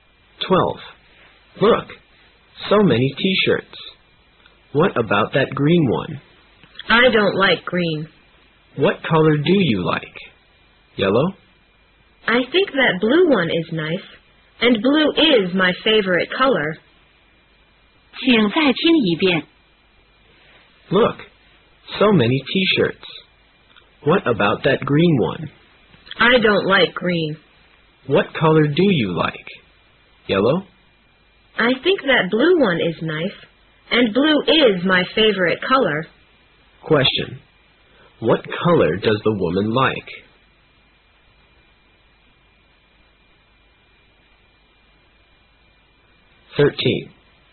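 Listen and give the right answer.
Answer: Blue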